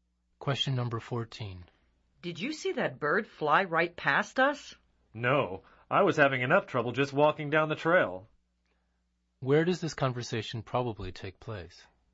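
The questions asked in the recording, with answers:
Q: Where does this conversation probably take place?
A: On a trail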